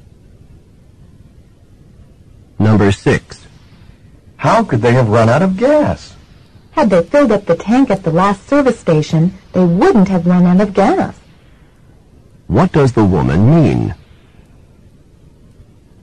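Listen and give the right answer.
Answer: They didn't fill up the tank at the last service station.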